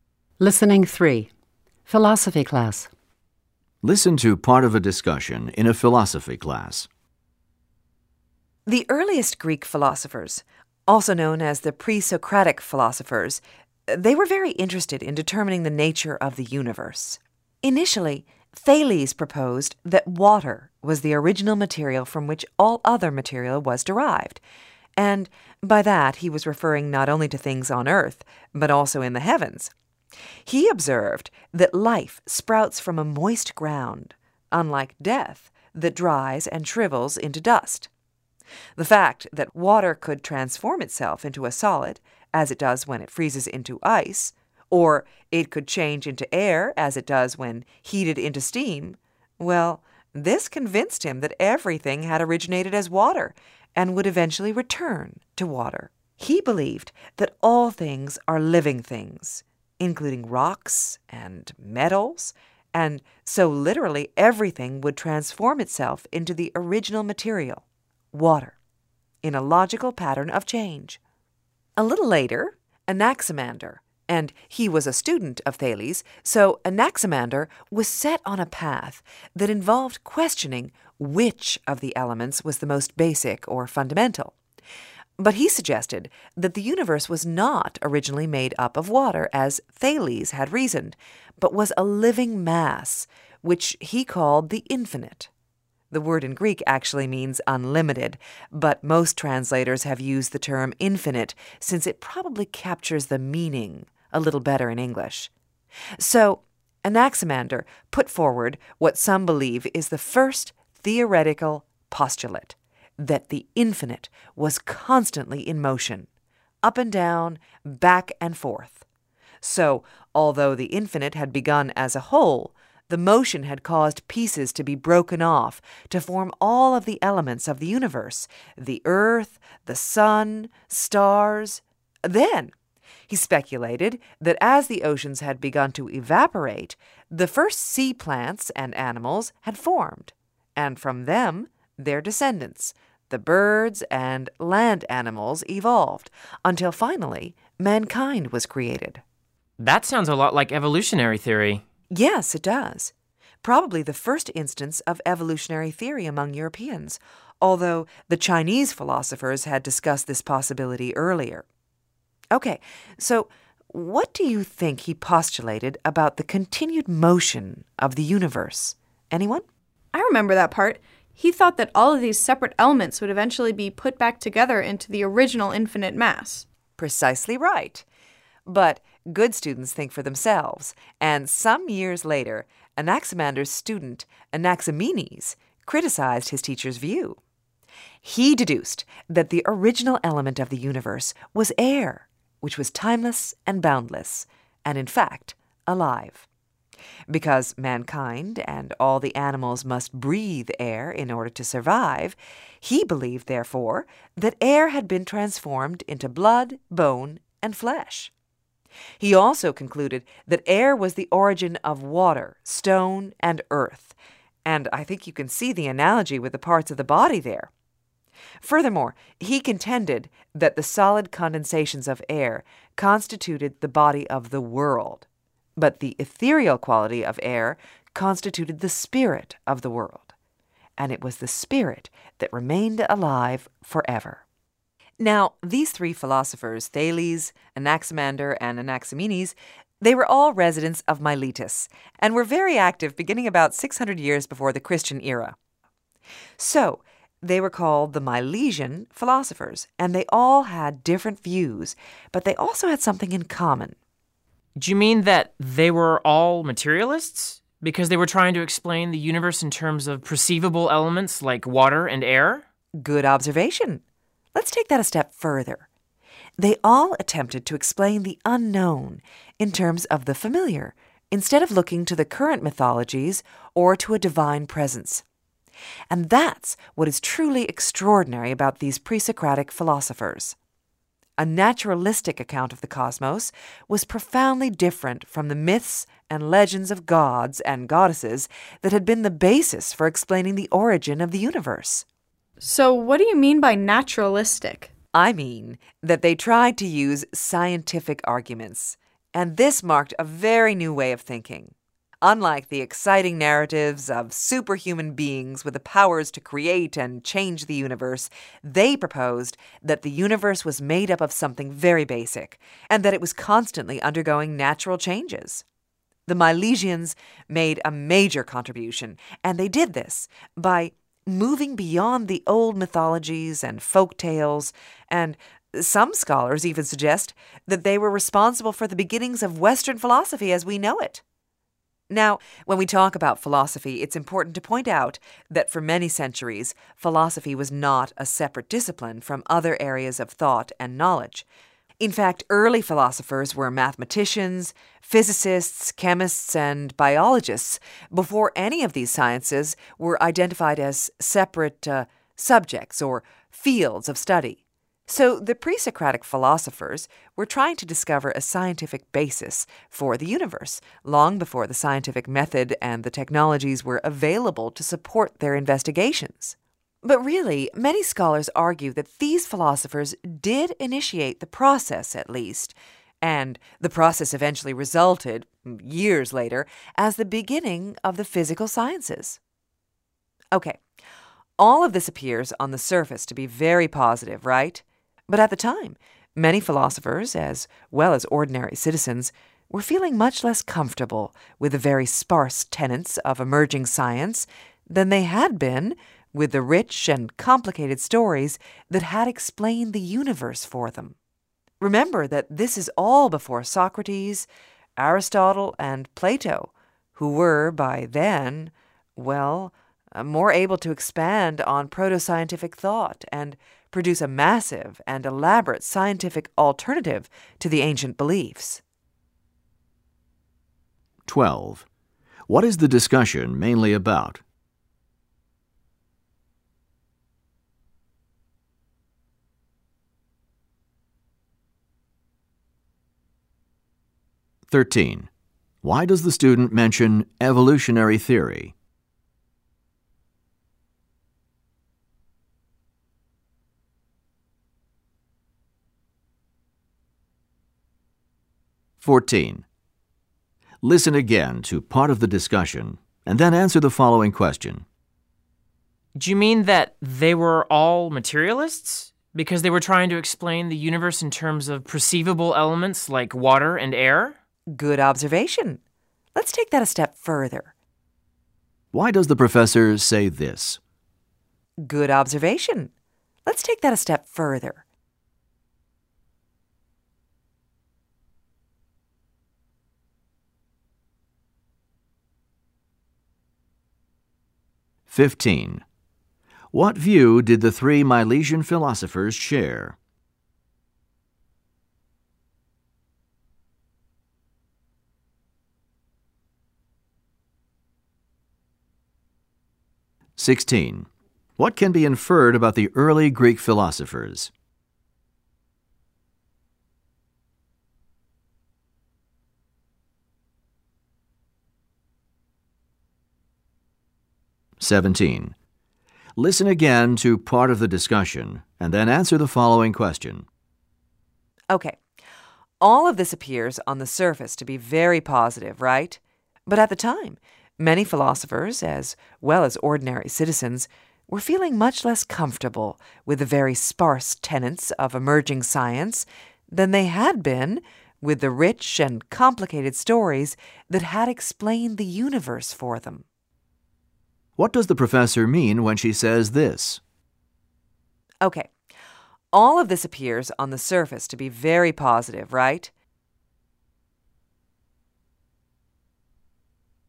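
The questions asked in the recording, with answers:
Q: What is the discussion mainly about?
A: The Milesian (pre-Socratic) philosophers' views on the nature of the universe

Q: What view did the three Milesian philosophers share?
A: They explained the universe naturalistically, in terms of familiar elements rather than myths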